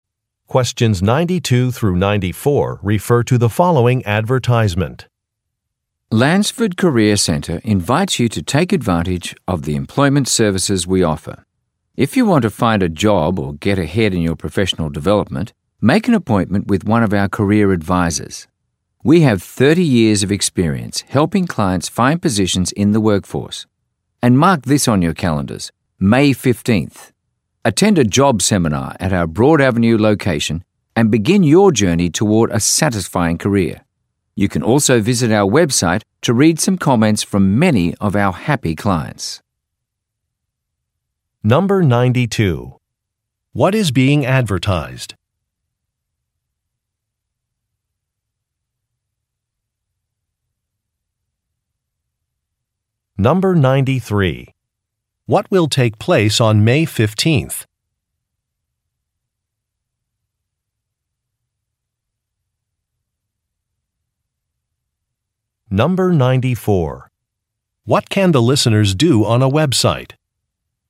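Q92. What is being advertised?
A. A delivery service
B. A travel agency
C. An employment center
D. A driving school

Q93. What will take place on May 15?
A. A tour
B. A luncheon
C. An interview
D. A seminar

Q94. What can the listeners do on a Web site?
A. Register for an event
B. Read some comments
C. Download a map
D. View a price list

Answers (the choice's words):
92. An employment center
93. A seminar
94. Read some comments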